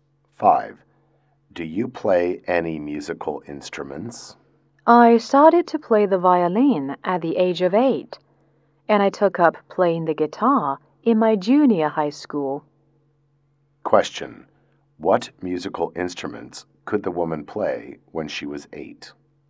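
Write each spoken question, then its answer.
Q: What musical instruments could the woman play when she was 8?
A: The violin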